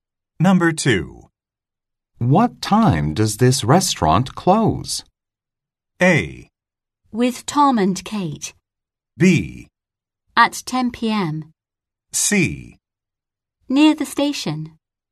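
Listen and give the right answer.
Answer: B: At 10 p.m.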